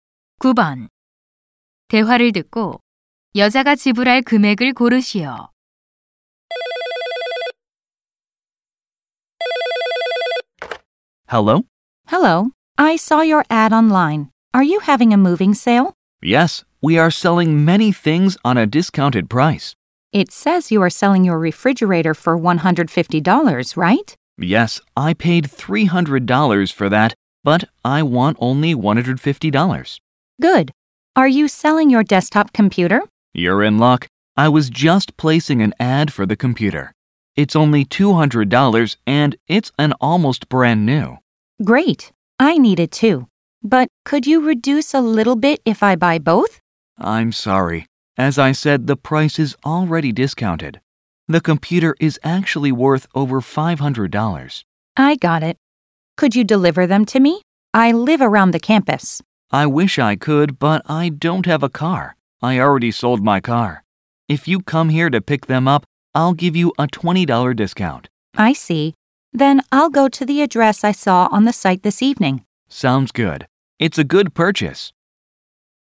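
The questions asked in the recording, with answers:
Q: 대화를 듣고 여자가 지불할 금액을 고르시오.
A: $330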